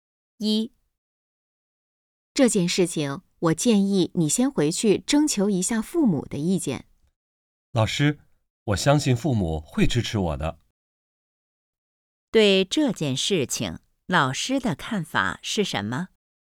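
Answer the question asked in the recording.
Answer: 应该先回去征求父母的意见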